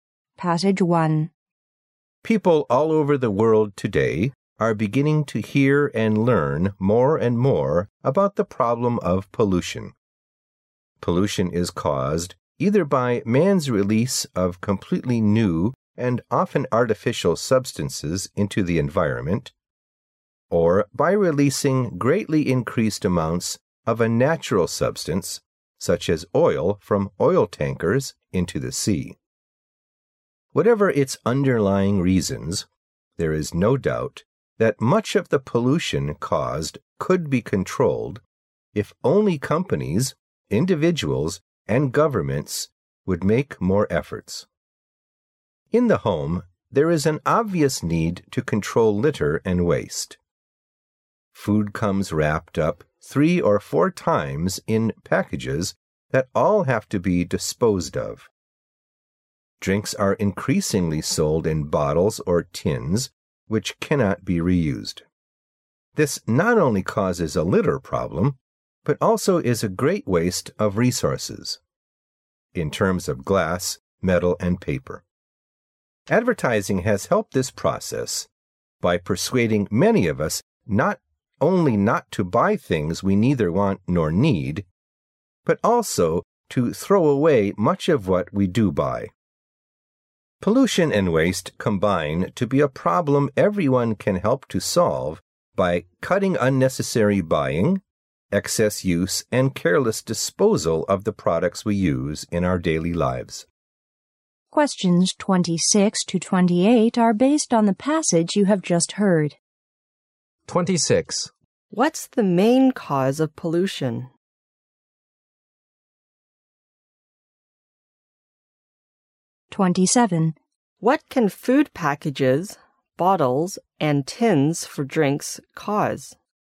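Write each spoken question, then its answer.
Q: What can food packages, bottles, and tins for drinks cause?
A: A litter problem and a waste of resources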